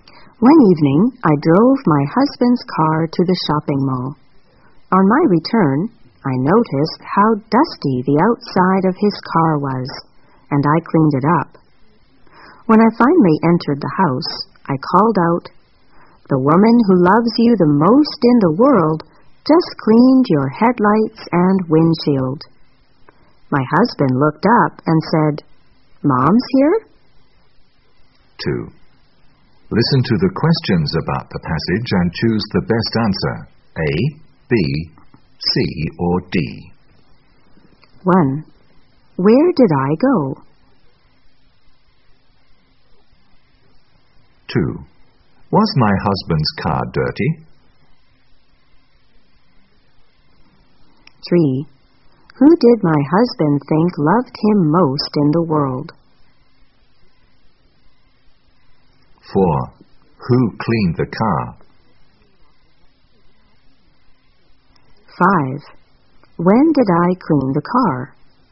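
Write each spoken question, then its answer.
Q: Where did I go?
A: To the shopping mall

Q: Was my husband's car dirty?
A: Yes, it was dusty

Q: Who did my husband think loved him most in the world?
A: His mom

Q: Who cleaned the car?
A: I (his wife) did

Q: When did I clean the car?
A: On my return from the shopping mall one evening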